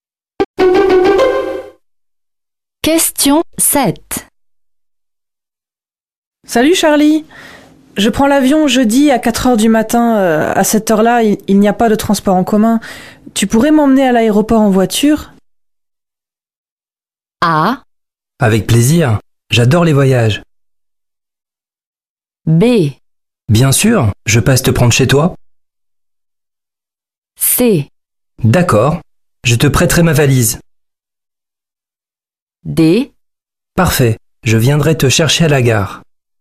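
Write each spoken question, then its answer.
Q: Tu pourrais m'emmener à l'aéroport en voiture?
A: B: Bien sûr, je passe te prendre chez toi.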